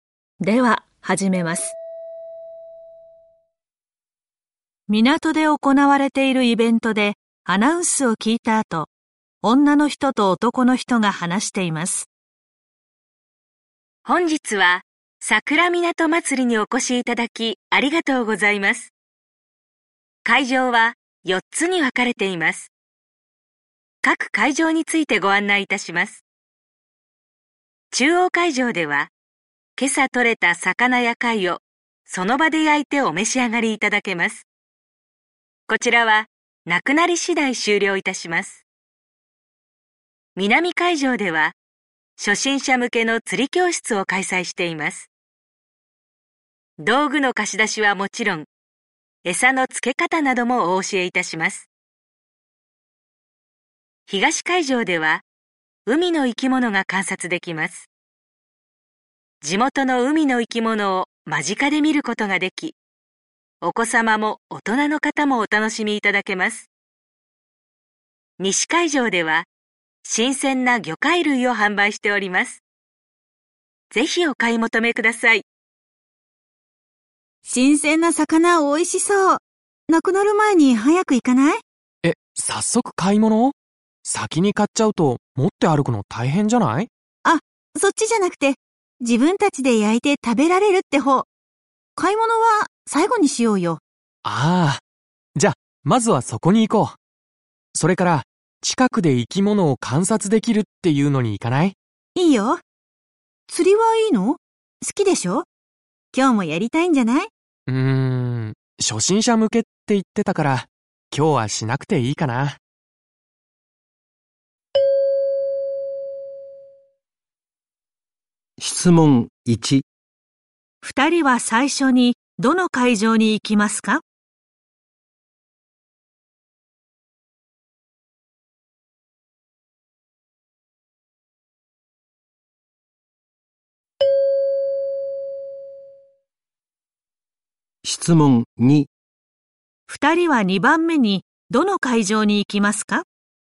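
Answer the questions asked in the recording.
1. 中央会場
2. 東会場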